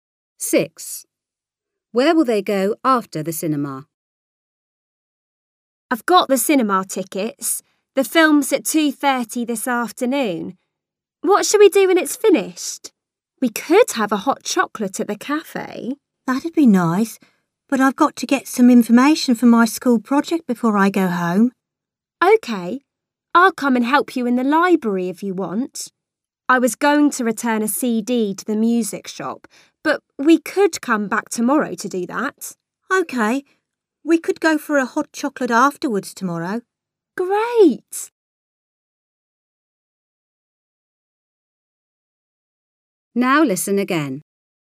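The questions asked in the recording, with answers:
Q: Where will they go after the cinema?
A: To the library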